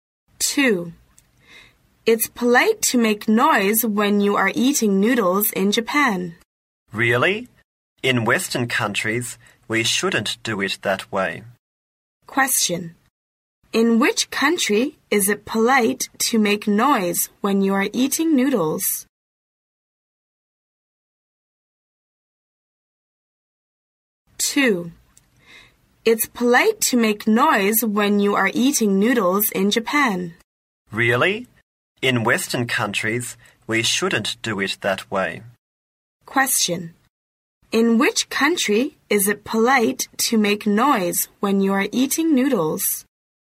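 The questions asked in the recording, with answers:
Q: Question. In which country is it polite to make noise when you are eating noodles?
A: Japan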